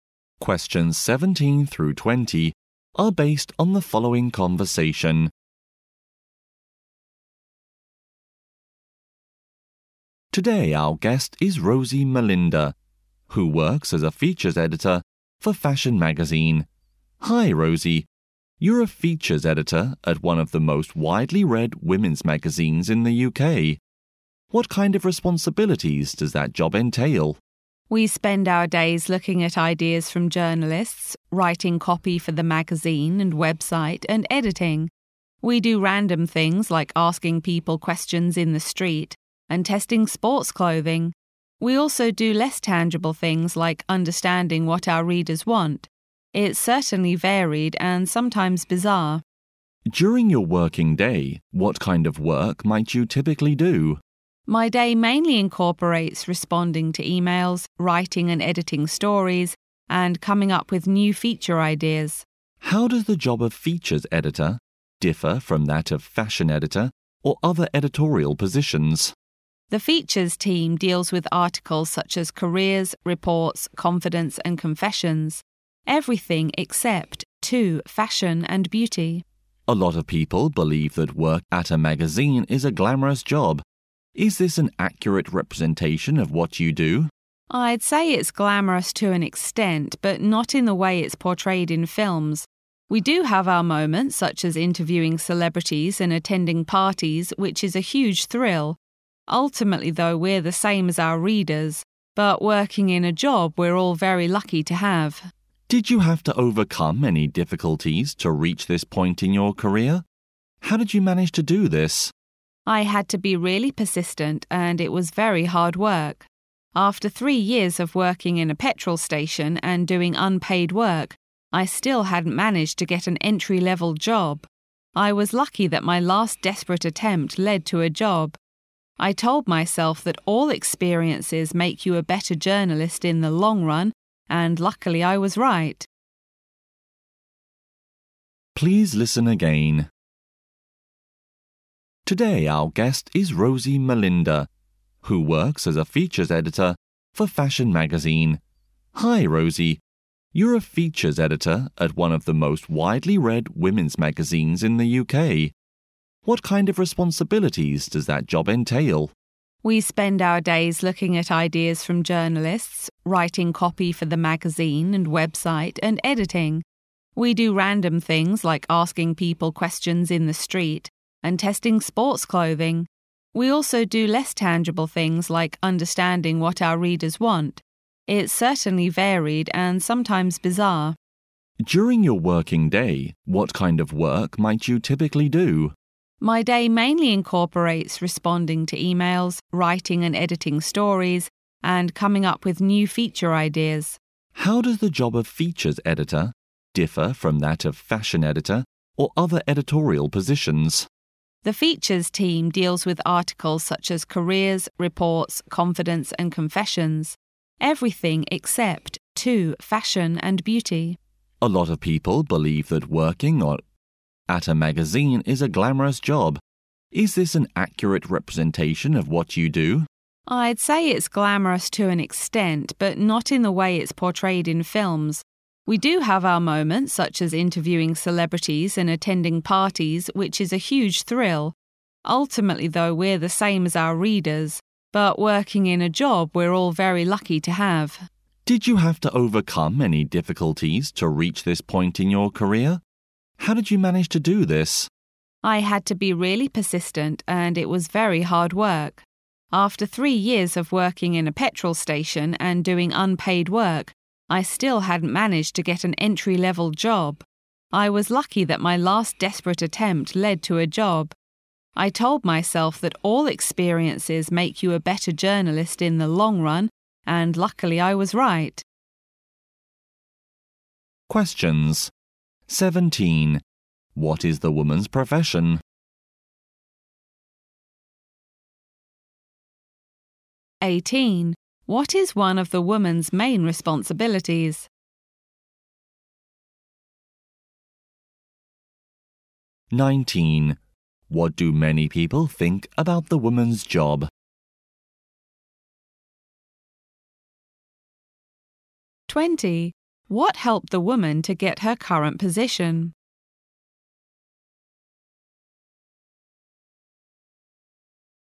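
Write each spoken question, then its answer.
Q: What is the woman's profession?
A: Features editor at a magazine

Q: What do many people think about the woman's job?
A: That it is glamorous

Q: What helped the woman to get her current position?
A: Persistence and hard work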